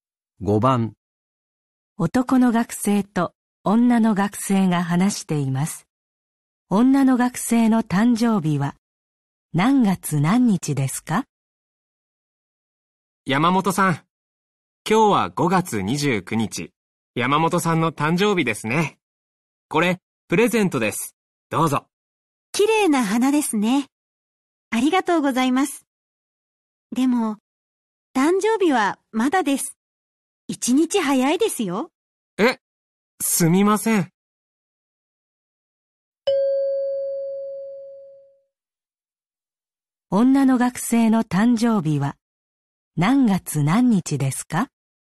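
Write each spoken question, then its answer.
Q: 女の学生の誕生日は何月何日ですか?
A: 5月30日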